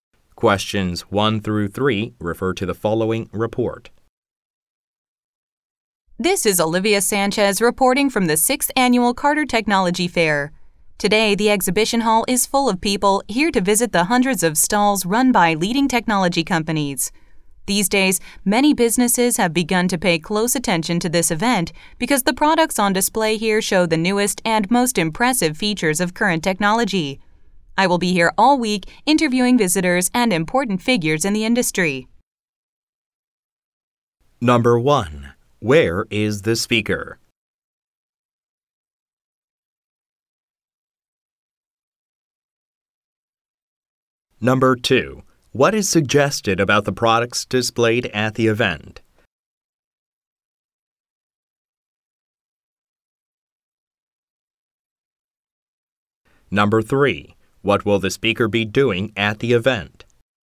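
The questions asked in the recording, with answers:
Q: Where is the speaker?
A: At the Carter Technology Fair

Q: What is suggested about the products displayed at the event?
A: They show the newest features of current technology

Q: What will the speaker be doing at the event?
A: Interviewing visitors and important figures in the industry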